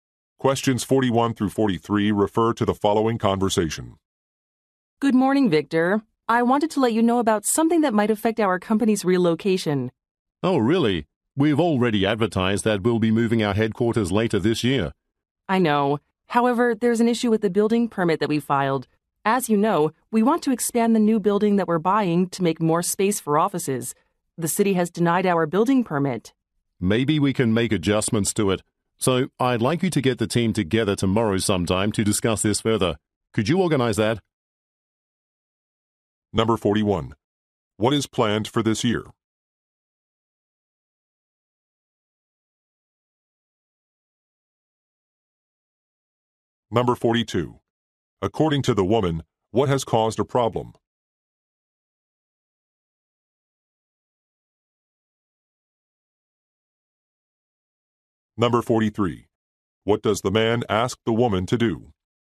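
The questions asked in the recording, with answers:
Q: What is planned for this year?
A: Moving the company headquarters

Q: According to the woman, what has caused a problem?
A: The city denied the building permit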